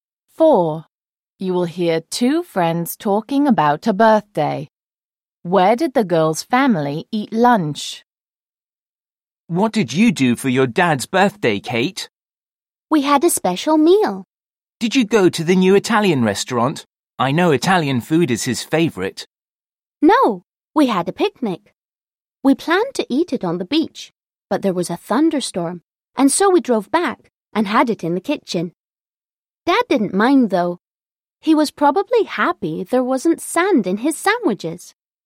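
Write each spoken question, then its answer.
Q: Where did the girl's family eat lunch?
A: In the kitchen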